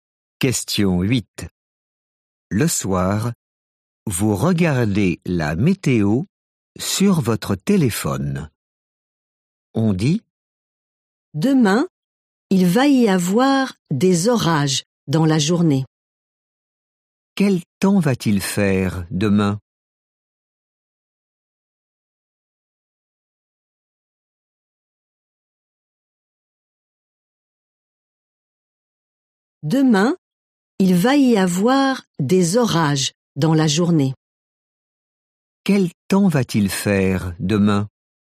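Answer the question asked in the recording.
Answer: des orages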